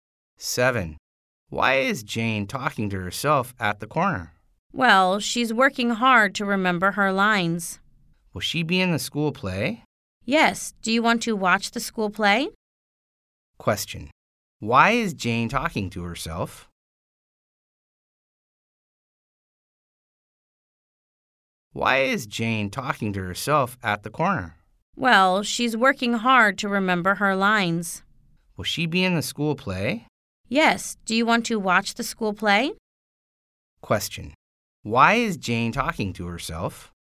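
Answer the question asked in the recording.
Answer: She is trying to remember her lines for the school play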